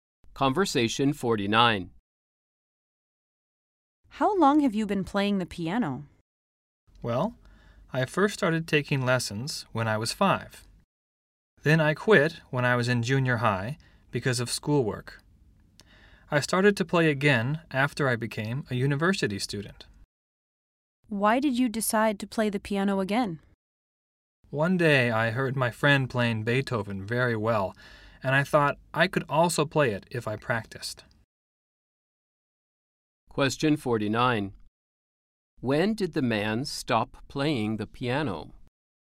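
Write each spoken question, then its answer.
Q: When did the man stop playing the piano?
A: When he was in junior high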